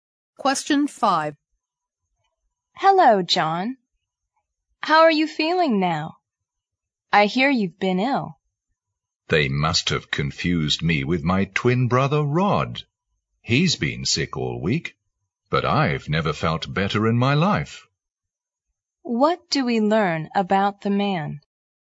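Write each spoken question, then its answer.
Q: What do we learn about the man?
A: He hasn't been ill; his twin brother Rod has been sick.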